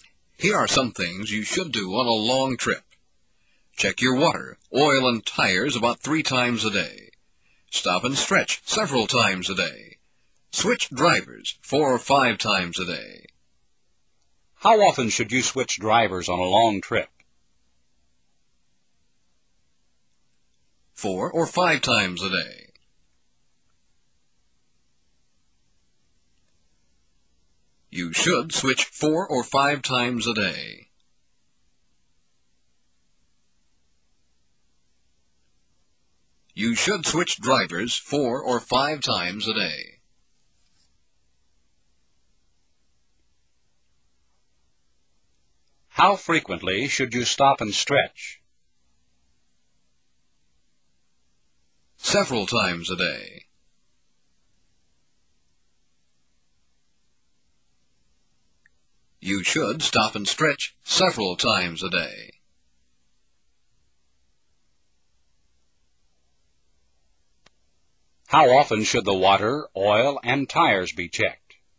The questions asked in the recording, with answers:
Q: How often should you switch drivers on a long trip?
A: 4 or 5 times a day. You should switch 4 or 5 times a day.

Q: How frequently should you stop and stretch?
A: Several times a day. You should stop and stretch several times a day.

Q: How often should the water, oil, and tires be checked?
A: About 3 times a day. They should be checked about 3 times a day.